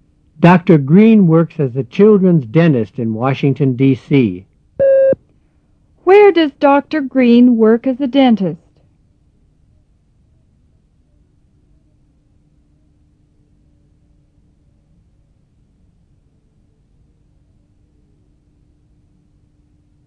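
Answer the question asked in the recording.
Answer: In Washington, D.C.

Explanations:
Dr. Green works as a children's dentist in Washington D. C.

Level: 入门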